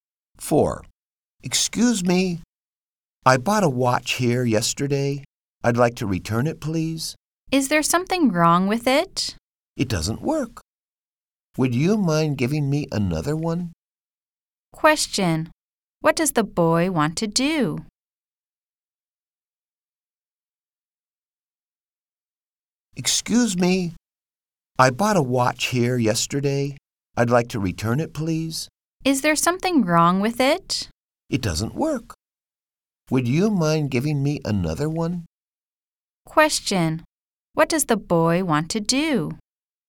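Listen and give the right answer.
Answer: Exchange the broken watch for another one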